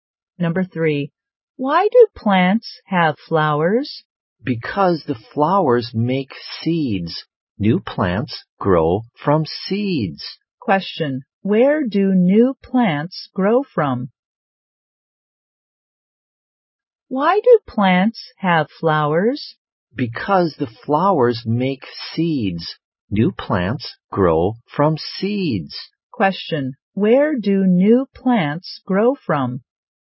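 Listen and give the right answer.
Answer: From seeds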